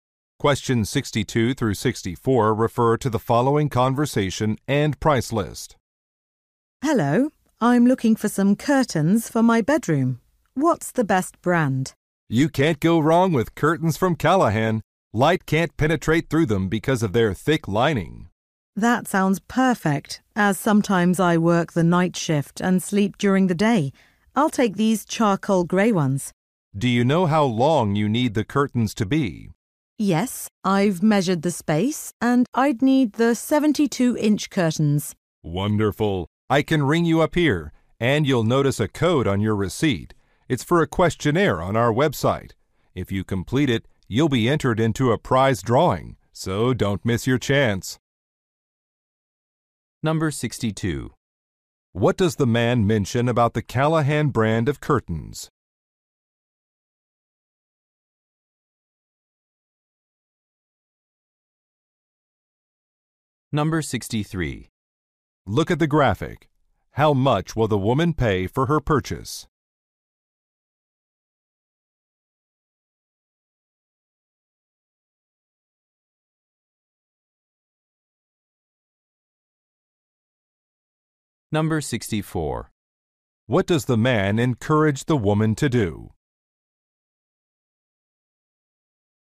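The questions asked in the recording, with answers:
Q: What does the man mention about the Callahan brand of curtains?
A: They block light with thick lining

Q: What does the man encourage the woman to do?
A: Complete an online questionnaire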